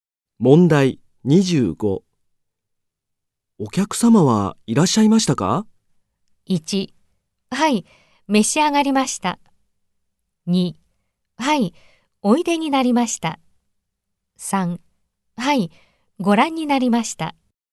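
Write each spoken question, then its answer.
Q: お客様はいらっしゃいましたか?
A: 2: はい、おいでになりました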